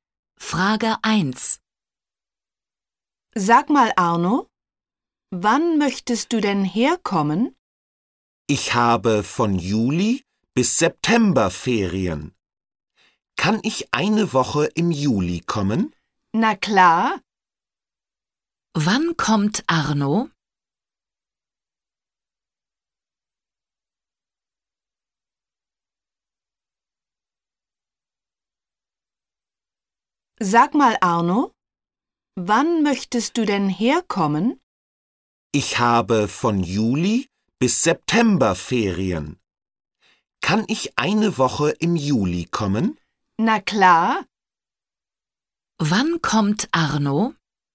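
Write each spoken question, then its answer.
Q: Wann kommt Arno?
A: Im Juli (eine Woche)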